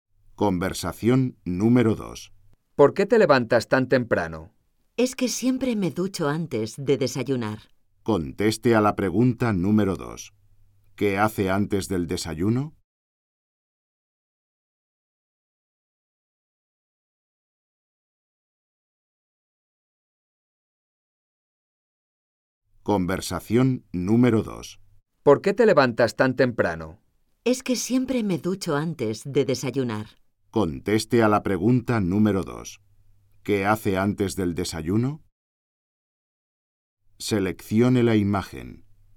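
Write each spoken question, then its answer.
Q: ¿Qué hace antes del desayuno?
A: Se ducha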